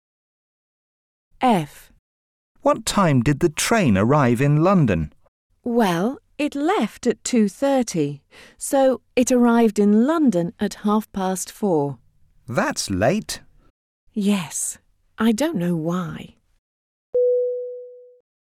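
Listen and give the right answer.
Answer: 4:30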